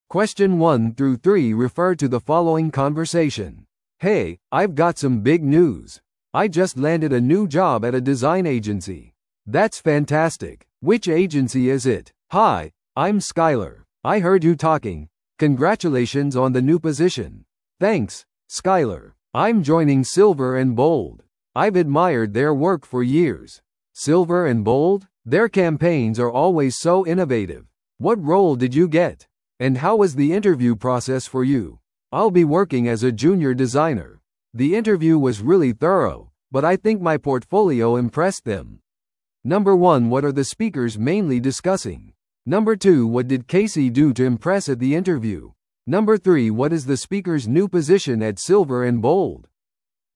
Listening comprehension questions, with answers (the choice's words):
Listen to the audio below and answer the questions.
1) What are the speakers mainly discussing?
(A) 新しい従業員を雇うプロセス。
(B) 話者のデザイン会社での新しい仕事。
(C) デザイン会社の面接技術。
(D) シルバー&ボールド最新のキャンペーン。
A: 話者のデザイン会社での新しい仕事。

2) What did Casey do to impress at the interview?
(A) 優れたコミュニケーションスキルを示した。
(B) よく準備されたポートフォリオを提示した。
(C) 企業の知識を示した。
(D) スカイラーからの推薦状を持ってきた。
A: よく準備されたポートフォリオを提示した。

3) What is the speaker's new position at Silver & Bold?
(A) シニアデザイナー。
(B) アートディレクター。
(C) ジュニアデザイナー。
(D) プロジェクトマネージャー。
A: ジュニアデザイナー。

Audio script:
A: Hey, I've got some big news! I just landed a new job at a design agency!
B: That's fantastic! Which agency is it?
C: Hi, I'm Skyler. I heard you talking – congratulations on the new position!
A: Thanks, Skyler. I'm joining Silver & Bold. I've admired their work for years.
B: Silver & Bold? Their campaigns are always so innovative. What role did you get?
C: And how was the interview process for you?
A: I'll be working as a Junior Designer. The interview was really thorough, but I think my portfolio impressed them.